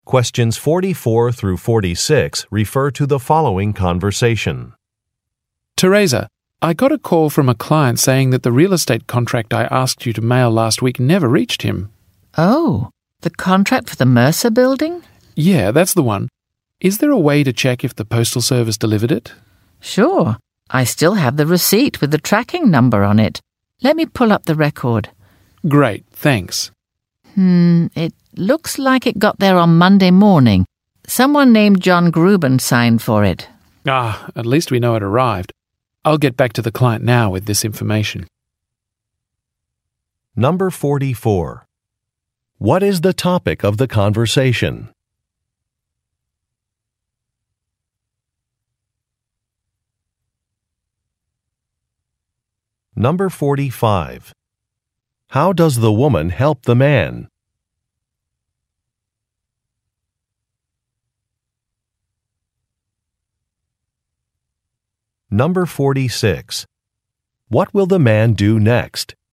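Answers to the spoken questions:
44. Whether a mailed real estate contract was delivered to a client
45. She checks the delivery record using the tracking number on the receipt
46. Contact the client with the delivery information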